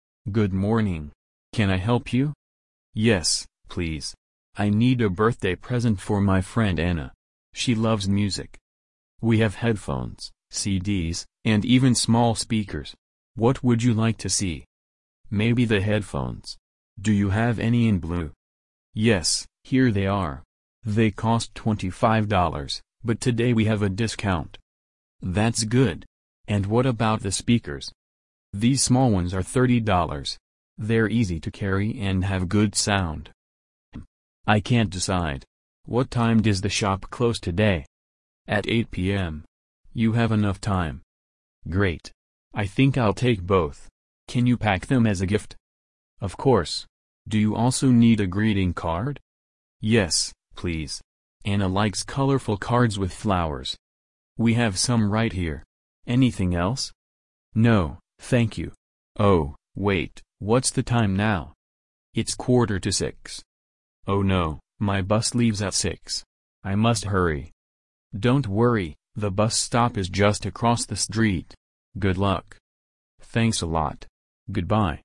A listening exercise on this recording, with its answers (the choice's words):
Прослушайте диалог и выберите правильный вариант ответа для каждого вопроса (A–E).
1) What colour headphones does the customer want?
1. Blue.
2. Red.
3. Black.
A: Blue.

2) How much are the speakers?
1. $20.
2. $25.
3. $30.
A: $30.

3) What kind of greeting card does Anna like?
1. With flowers.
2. With animals.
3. With stars.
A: With flowers.

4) Why must the customer hurry?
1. The shop is closing.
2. The bus leaves soon.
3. The speakers are heavy.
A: The bus leaves soon.

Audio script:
– Good morning! Can I help you?
– Yes, please. I need a birthday present for my friend Anna. She loves music.
– We have headphones, CDs, and even small speakers. What would you like to see?
– Maybe the headphones. Do you have any in blue?
– Yes, here they are. They cost $25, but today we have a discount.
– That's good. And what about the speakers?
– These small ones are $30. They're easy to carry and have good sound.
– Hmm, I can't decide. What time does the shop close today?
– At 8 pm. You have enough time.
– Great. I think I'll take both. Can you pack them as a gift?
– Of course. Do you also need a greeting card?
– Yes, please. Anna likes colourful cards with flowers.
– We have some right here. Anything else?
– No, thank you. Oh, wait — what's the time now?
– It's quarter to six.
– Oh no, my bus leaves at six! I must hurry.
– Don't worry, the bus stop is just across the street. Good luck!
– Thanks a lot. Goodbye!